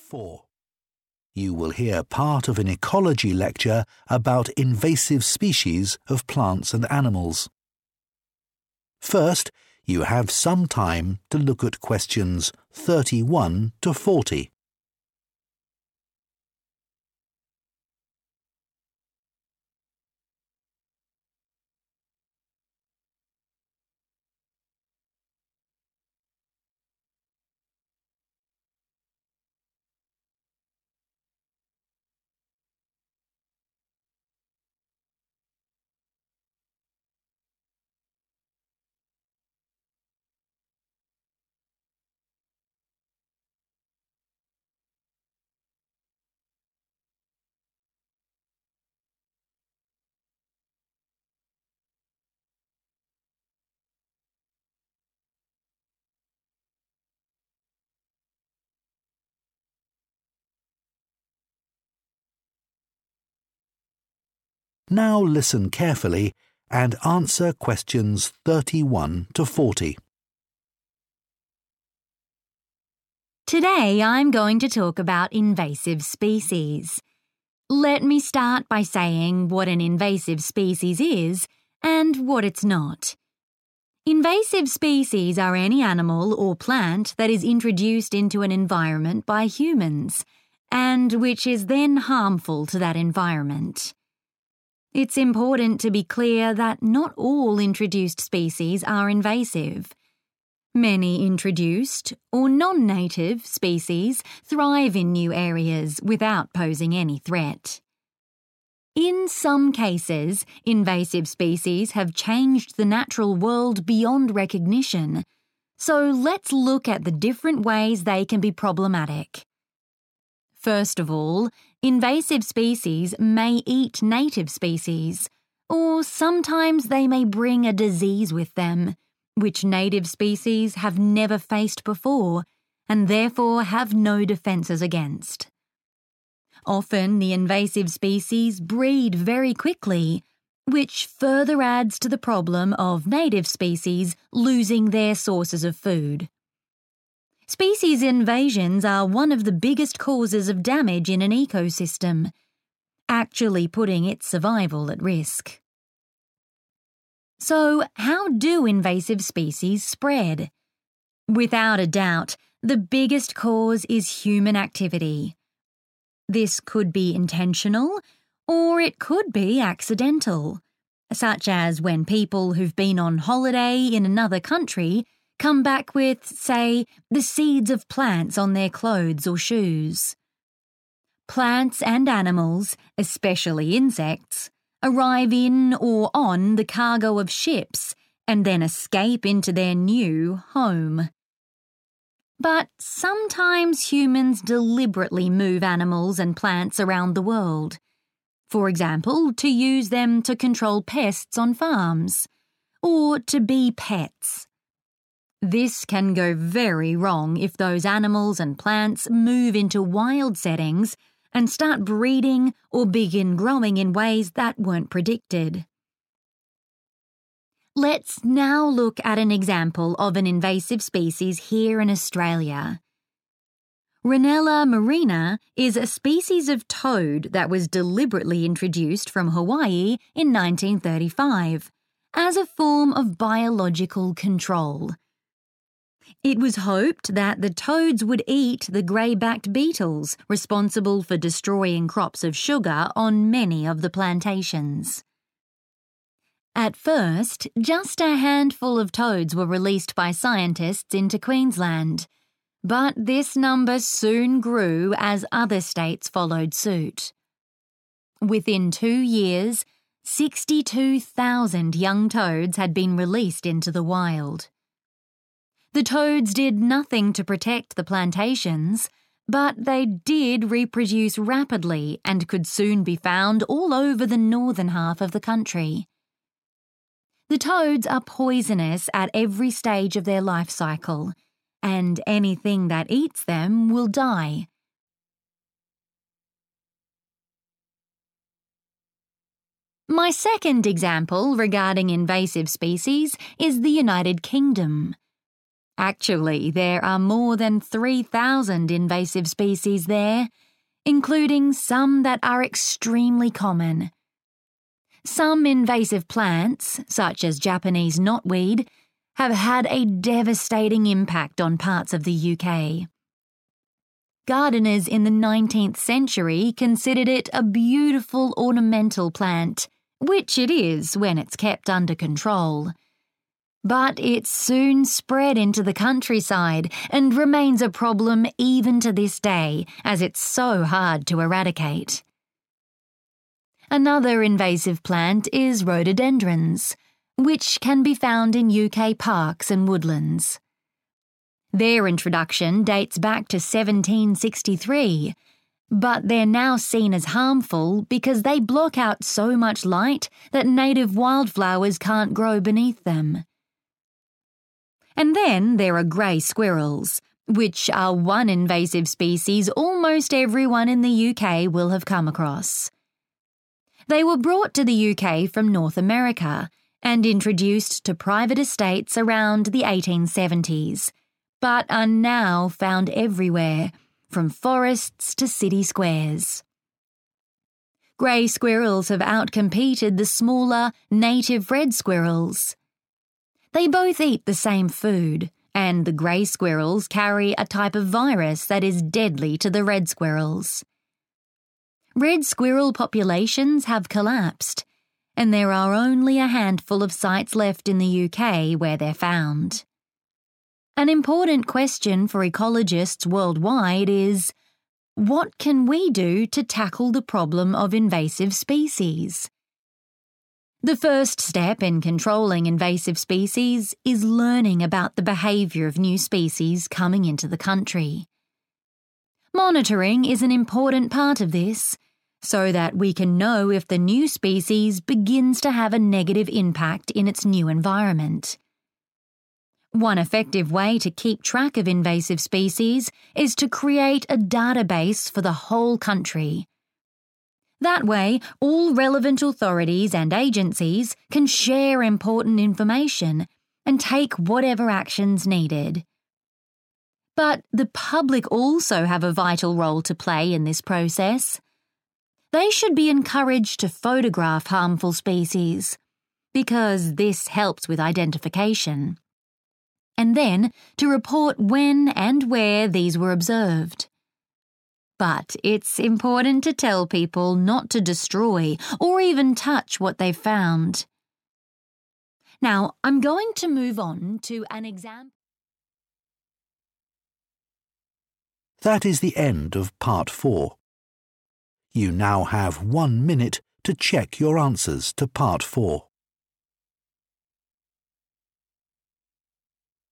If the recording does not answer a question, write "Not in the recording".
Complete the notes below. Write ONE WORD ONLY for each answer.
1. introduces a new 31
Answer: disease

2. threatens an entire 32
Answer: ecosystem

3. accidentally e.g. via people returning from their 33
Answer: holidays / holiday

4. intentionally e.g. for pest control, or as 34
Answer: pets

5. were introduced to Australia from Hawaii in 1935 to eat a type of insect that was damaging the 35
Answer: sugar

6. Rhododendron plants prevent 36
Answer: light

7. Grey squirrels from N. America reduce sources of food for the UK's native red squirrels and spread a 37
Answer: virus

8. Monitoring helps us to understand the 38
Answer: behaviour / behavior

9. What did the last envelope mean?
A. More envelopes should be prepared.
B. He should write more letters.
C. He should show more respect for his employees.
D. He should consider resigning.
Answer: Not in the recording

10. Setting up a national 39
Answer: database

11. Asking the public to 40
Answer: photograph

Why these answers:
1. The correct answer is 'disease' because the speaker lists it as one of the specific ways invasive species cause problems. When a new species arrives, it often carries germs or sicknesses that the local, native animals have never seen before. Because these native animals have no way to fight the sickness, it causes them great harm. This matches the point in the notes about introducing something new and harmful.
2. The correct answer is 'ecosystem' because the transcript states that invasive species are a major cause of damage within these biological communities. It specifically mentions that species invasions can put the survival of an ecosystem at risk. In the context of the notes, 'putting its survival at risk' is synonymous with 'threatens'.
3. The correct answer is holiday because the speaker explains that human activity is the biggest reason invasive species spread. This can happen by accident when people return from a trip (holiday) and unknowingly bring seeds on their clothes or shoes. The transcript specifically uses the phrase "been on holiday" to describe this accidental spread.
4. The correct answer is located in the section of the transcript discussing how humans intentionally move species to new places. It lists "pest control" as one reason and then mentions "pets" as another reason humans choose to bring animals into a new environment. Since the notes ask for a word describing why species are spread intentionally, "pets" fits perfectly.
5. The correct answer is sugar because the speaker talks about why people brought certain toads to Australia in 1935. They wanted these toads to eat a type of beetle. These beetles were ruining the sugar crops being grown on large farms, which are called plantations.
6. The correct answer is light because the transcript explains that rhododendrons are harmful plants. This is because they grow in a way that stops sunshine from getting to the smaller flowers on the ground. In the text, the phrase 'block out' means the same as 'prevent from reaching', and 'native wild flowers' are a type of 'native plant'.
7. The correct answer is found in the section about squirrels in the UK. The speaker explain that grey squirrels carry a 'virus'. They describe this virus as 'deadly' to the red squirrels. To be 'deadly' means it has the power to kill. Therefore, a virus is the thing they spread that kills the native squirrels.
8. The correct answer is "behaviour" because the speaker identifies it as the first thing we must learn to manage invasive species. The text explains that monitoring is a key tool used to study these actions and understand how the species affects its new home. Finding out how a species acts helps ecologists decide how to stop it.
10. The correct answer is database because the speaker identifies it as a useful tool for monitoring invasive species across an entire nation. By having a central place for information, different groups can share their findings and decide how to act. Important words to notice are track, which means to follow or monitor, and database.
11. The correct answer is found in the final section about how common people can help experts. The speaker suggests that the public should be encouraged to take pictures of harmful plants or animals. This helps scientists identify them. After taking a picture, people should then report where and when they saw the species to help with monitoring.

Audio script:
Today I'm going to talk about invasive species. Let me start by saying what an invasive species is and what it's not. Invasive species are any animal or plant that is introduced into an environment by humans, and which is then harmful to that environment. It's important to be clear that not all introduced species are invasive. Many introduced – or non-native – species thrive in new areas without posing any threat.
In some cases, invasive species have changed the natural world beyond recognition, so let's look at the different ways they can be problematic. First of all, invasive species may eat native species, or sometimes they may bring a disease with them, which native species have never faced before and therefore have no defences against. Often the invasive species breed very quickly – which further adds to the problem of native species losing their sources of food. Species invasions are one of the biggest causes of damage in an ecosystem, actually putting its survival at risk.
So, how do invasive species spread? Without a doubt, the biggest cause is human activity. This could be intentional, or it could be accidental, such as when people who've been on holiday in another country come back with, say, the seeds of plants on their clothes or shoes. Plants and animals, especially insects, arrive in or on the cargo of ships, and then escape into their new 'home'. But sometimes humans deliberately move animals and plants around the world, for example to use them to control pests on farms, or to be pets. This can go very wrong if those animals and plants move into wild settings and start breeding or begin growing in ways that weren't predicted.
Let's now look at an example of an invasive species here in Australia: Rhinella marina is a species of toad that was deliberately introduced from Hawaii in 1935 as a form of biological control. It was hoped that the toads would eat the grey-backed beetles responsible for destroying crops of sugar on many of the plantations. At first, just a handful of toads were released by scientists into Queensland, but this number soon grew as other states followed suit. Within two years, 62,000 young toads had been released into the wild. The toads did nothing to protect the plantations, but they did reproduce rapidly and could soon be found all over the northern half of the country. The toads are poisonous at every stage of their life cycle, and anything that eats them will die.
My second example regarding invasive species is the United Kingdom. Actually, there are more than three-thousand invasive species there, including some that are extremely common. Some invasive plants, such as Japanese knotweed, have had a devastating impact on parts of the UK. Gardeners in the nineteenth century considered it a beautiful ornamental plant – which it is, when it's kept under control – but it soon spread into the countryside and remains a problem even to this day as it's so hard to eradicate. Another invasive plant is rhododendrons, which can be found in UK parks and woodlands. Their introduction dates back to 1763, but they're now seen as harmful because they block out so much light that native wild flowers can't grow beneath them.
And then there are grey squirrels, which are one invasive species almost everyone in the UK will have come across. They were brought to the UK from North America and introduced to private estates around the 1870s but are now found everywhere, from forests to city squares. Grey squirrels have outcompeted the smaller, native red squirrels. They both eat the same food, and the grey squirrels carry a type of virus that is deadly to the red squirrels. Red squirrel populations have collapsed, and there are only a handful of sites left in the UK where they're found.
An important question for ecologists worldwide is, what can we do to tackle the problem of invasive species? The first step in controlling invasive species is learning about the behaviour of new species coming into the country. Monitoring is an important part of this, so that we can know if the new species begins to have a negative impact in its new environment. One effective way to keep track of invasive species is to create a database for the whole country. That way, all relevant authorities and agencies can share important information and take whatever action's needed. But the public also have a vital role to play in this process. They should be encouraged to photograph harmful species – because this helps with identification – and then to report when and where these were observed. But it's important to tell people not to destroy or even touch what they've found.
Now, I'm going to move on to ...